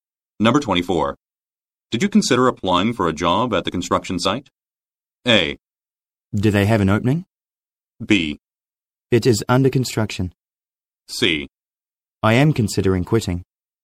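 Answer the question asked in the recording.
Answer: A: Do they have an opening?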